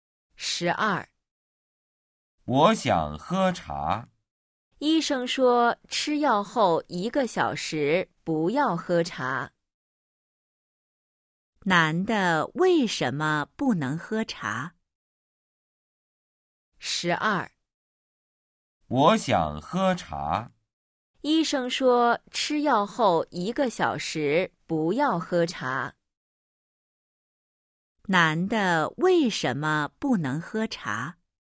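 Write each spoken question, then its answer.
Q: 男的为什么不能喝茶?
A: 他吃药了,医生说吃药后一个小时不要喝茶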